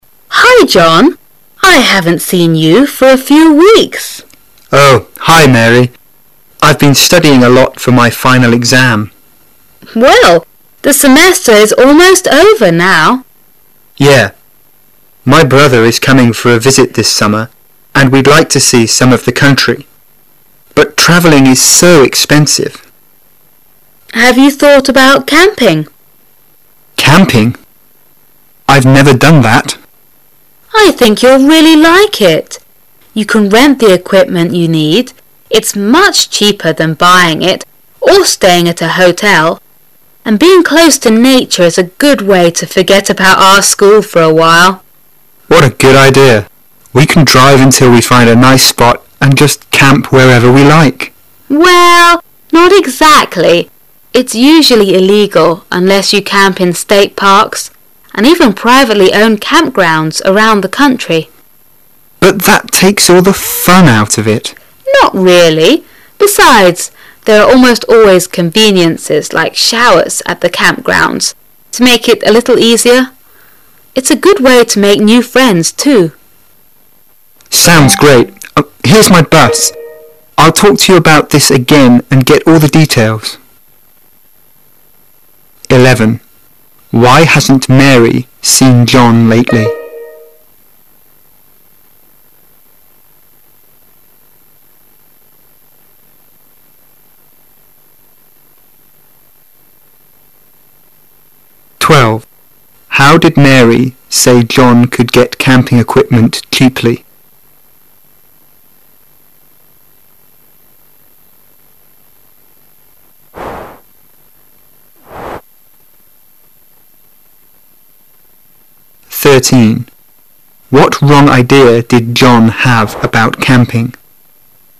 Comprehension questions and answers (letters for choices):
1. How did Mary say John could get camping equipment cheaply?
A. Buy it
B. Rent it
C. Borrow it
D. Make it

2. What wrong idea did John have about camping?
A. Camping is not fun.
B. Camping is unsafe.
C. He could camp anywhere he wanted.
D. He needed a lot of experience.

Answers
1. B
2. C

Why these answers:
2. 事件与情景题,由"We can drive until we find a nice spot and just camp where we like"及"Well,not exactly"推出答案。

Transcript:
[解析] 11-13 Woman: Hi, John, I haven't seen you for a few weeks. Man: Oh, hi, Mary. I've been studying a lot for my final exam. Woman: Well, the semester is almost over now. Man: Yeah. My brother is coming for a visit this summer, and we'd like to see some of the country. But traveling is so expensive. Woman: Have you thought about camping? Man: Camping? I've never done that! Woman: I think you'll really like it. You can rent the equipment you need. Ifs much cheaper than buying it or staying at a hotel. And being close to Nature is a good way to forget about our school for a while. Man: What a good idea! We can drive until we find a nice spot and just camp wherever we like. Woman: Well, not exactly. It's usually illegal unless you camp in state parks and even privately owned camp grounds around the country. Man: But that takes all the fun out of it. Woman: Not really. Besides, there are almost always conveniences like showers at the camp grounds to make it a little easier. Ifs a good way to make new friends, too. Man: Sounds great! Here's my bus. I'll talk to you about this again and get all the details. Why hasn't Mary seen John lately?